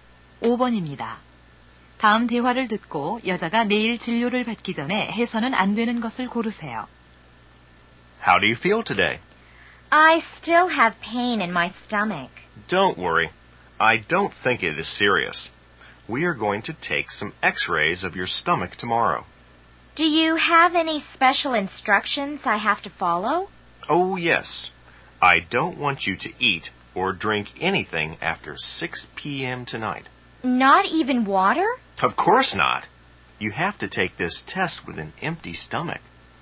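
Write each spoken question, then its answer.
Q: 다음 대화를 듣고 여자가 내일 진료를 받기 전에 해서는 안 되는 것을 고르세요.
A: 오후 6시 이후 먹거나 마시기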